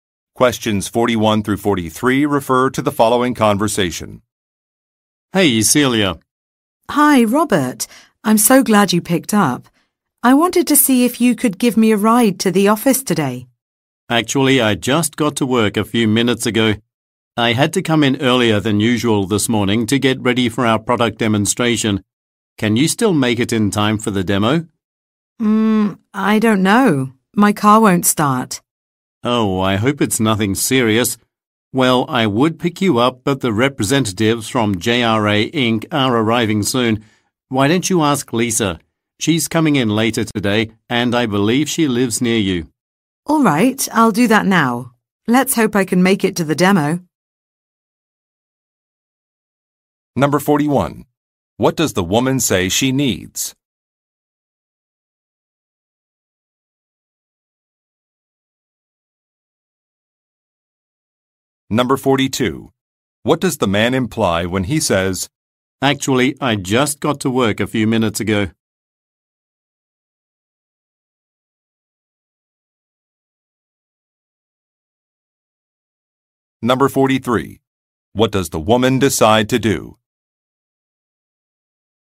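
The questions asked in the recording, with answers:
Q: What does the woman say she needs?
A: A ride to the office

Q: What does the man imply when he says,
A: He cannot give her a ride

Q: What does the woman decide to do?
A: Ask Lisa for a ride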